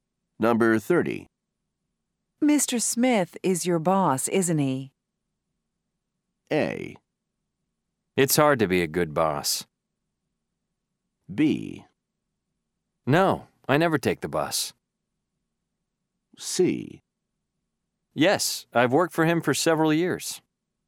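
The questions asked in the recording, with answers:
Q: Mr. Smith is your boss, isn't he?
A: C: Yes, I've worked for him for several years.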